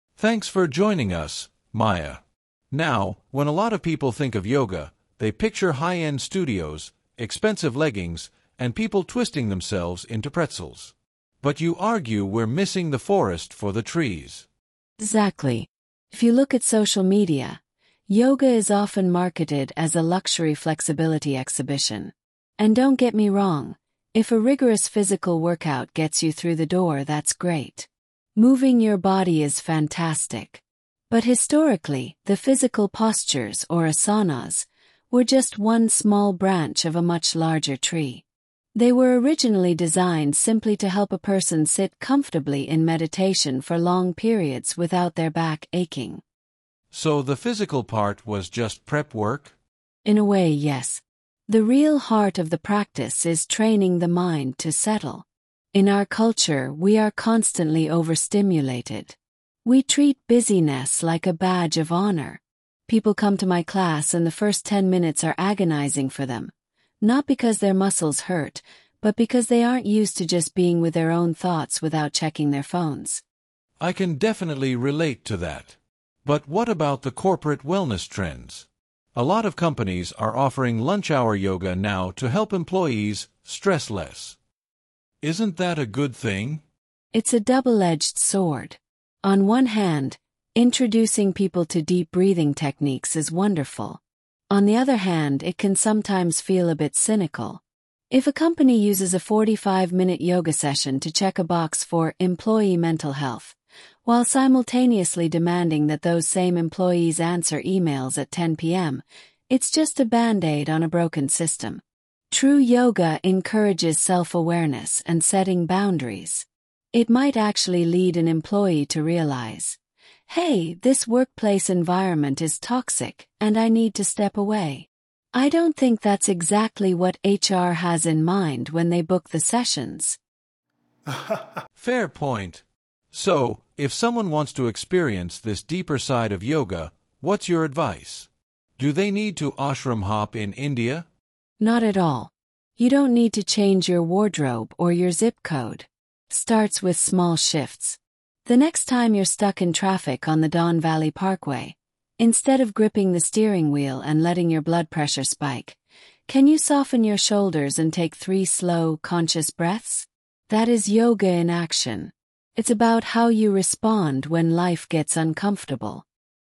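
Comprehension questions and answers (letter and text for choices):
Choose the correct answer:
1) What does the interviewer mean when he says people are "missing the forest for the trees"?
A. People are practicing yoga in the wrong environments.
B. People are focusing too much on small details instead of the main purpose.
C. People do not understand the historical origins of yoga in nature.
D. People are spending too much money on yoga clothing.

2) What is Maya's attitude toward people who do yoga just for a intense physical workout?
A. She is critical of them for ignoring the spiritual side.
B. She is accepting of it as long as it serves as a starting point.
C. She believes they are completely wasting their time.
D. She thinks social media has tricked them into hurting themselves.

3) According to Maya, what was the original historical purpose of the physical yoga poses?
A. To achieve maximum flexibility and physical strength.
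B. To cure chronic back pain caused by manual labor.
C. To prepare the body to remain still during meditation.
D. To test a person's mental discipline through pain.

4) Why does Maya describe the first ten minutes of her class as "agonizing" for some students?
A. The physical stretching is too intense for beginners.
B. They are frustrated because they cannot use their technology.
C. They find it difficult to cope with quietness and lack of distraction.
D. They feel guilty about being late to class.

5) Why does Maya use the phrase "badge of honor" to describe busy-ness?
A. To show that society highly values and praises being constantly active.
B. To suggest that employers reward employees who work fast.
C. To criticize people who brag about their jobs.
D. To explain why yoga instructors are in high demand.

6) What is Maya's main criticism of corporate lunch-hour yoga sessions?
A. Forty-five minutes is not enough time to get a proper workout.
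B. They are often used as a superficial solution to deeper workplace problems.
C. Human Resources departments do not understand how to teach breathing.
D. Employees are distracted because they are worried about their emails.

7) What does Maya imply when she says, "I don't think that's exactly what HR has in mind when they book the sessions!"?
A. HR departments want employees to quit their jobs.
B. HR expects yoga to make employees more obedient and productive, not question their environment.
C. HR does not realize that yoga can cause physical injuries.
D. HR managers rarely attend the yoga classes themselves.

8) When discussing going to an ashram in India, Maya's tone can best be described as...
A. Dismissive of traditional Eastern practices.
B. Encouraging for students who want a real challenge.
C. Practical, emphasizing that spiritual growth can happen anywhere.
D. Regretful that more people cannot afford to travel.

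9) Why does Maya bring up the example of being stuck in traffic on the Don Valley Parkway?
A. To prove that modern life is inherently more stressful than in the past.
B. To give a relatable example of how to apply yoga principles to daily stress.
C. To complain about the local infrastructure and transit system.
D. To advise listeners to practice driving meditation.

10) Overall, what is the main theme of Maya's message?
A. Yoga must be rescued from corporate greed and commercialization.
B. True yoga is an internal practice of mindfulness and reaction control, not an external display.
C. Meditation is superior to physical exercise for mental health.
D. Western society has completely ruined the true meaning of ancient traditions.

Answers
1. B. People are focusing too much on small details instead of the main purpose.
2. B. She is accepting of it as long as it serves as a starting point.
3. 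C. To prepare the body to remain still during meditation.
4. C. They find it difficult to cope with quietness and lack of distraction.
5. A. To show that society highly values and praises being constantly active.
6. B. They are often used as a superficial solution to deeper workplace problems.
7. B. HR expects yoga to make employees more obedient and productive, not question their environment.
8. C. Practical, emphasizing that spiritual growth can happen anywhere.
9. B. To give a relatable example of how to apply yoga principles to daily stress.
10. B. True yoga is an internal practice of mindfulness and reaction control, not an external display.

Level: High Intermediate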